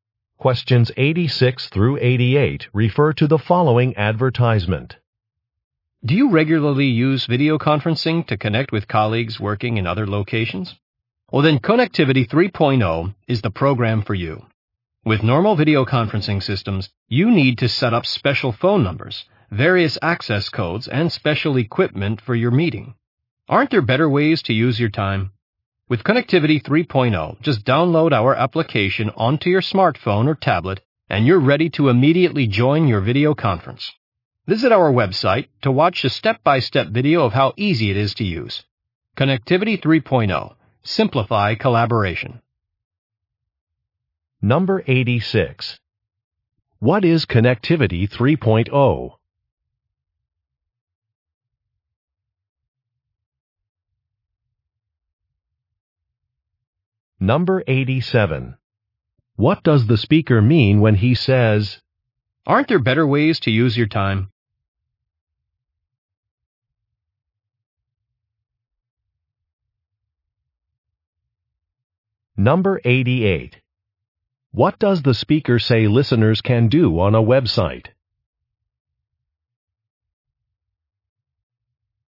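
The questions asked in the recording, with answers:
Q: What is Connectivity 3.0?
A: A video conferencing application

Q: What does the speaker say listeners can do on a website?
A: Watch a step-by-step video of how to use it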